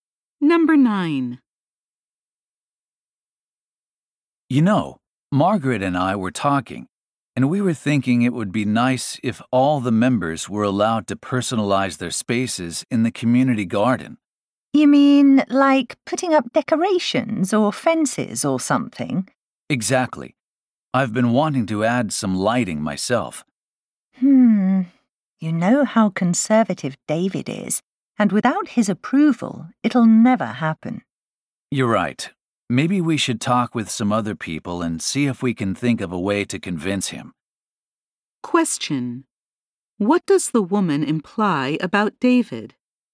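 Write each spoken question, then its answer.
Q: What does the woman imply about David?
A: He probably won't approve the idea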